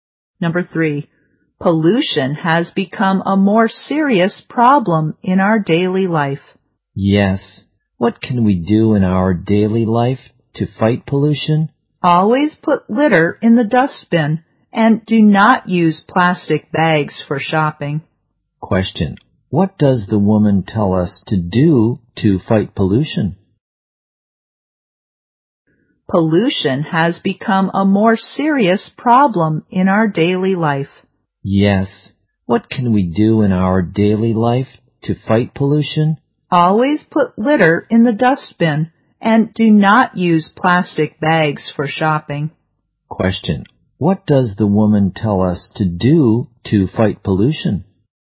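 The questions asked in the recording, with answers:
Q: Question, what does the woman tell us to do to fight pollution?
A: Put litter in the dustbin and not use plastic bags for shopping.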